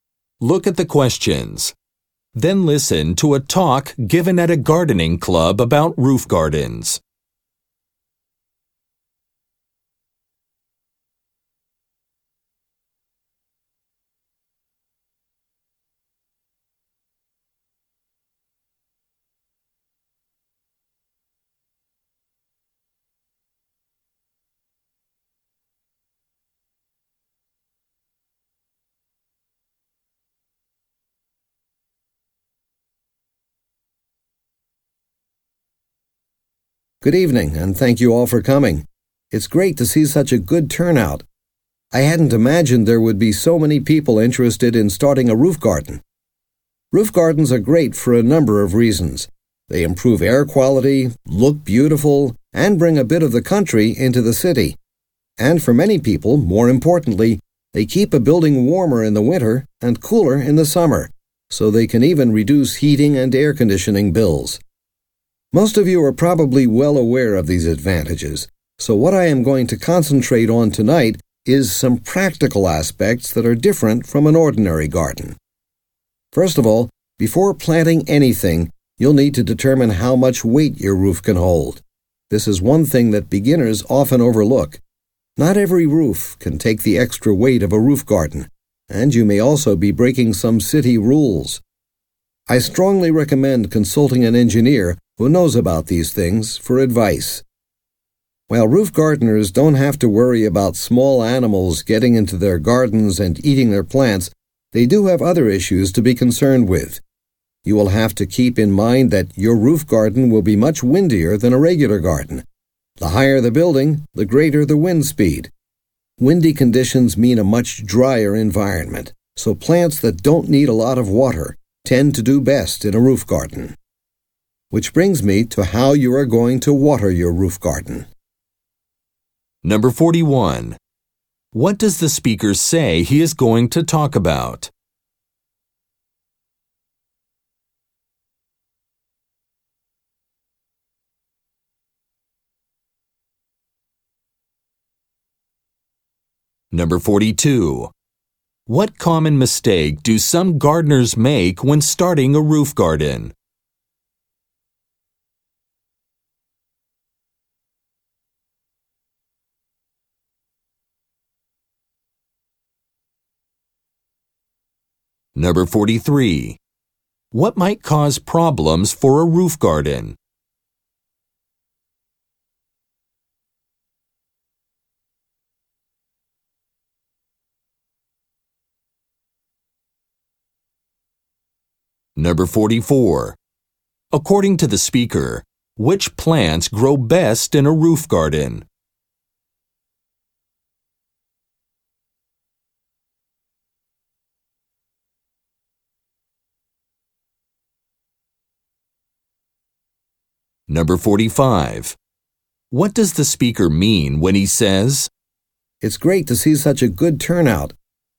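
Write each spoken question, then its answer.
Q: What does the speaker say he is going to talk about?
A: Practical aspects of roof gardens that differ from ordinary gardens

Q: What common mistake do some gardeners make when starting a roof garden?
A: Not checking how much weight the roof can hold

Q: What might cause problems for a roof garden?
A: Wind

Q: According to the speaker, which plants grow best in a roof garden?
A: Plants that don't need a lot of water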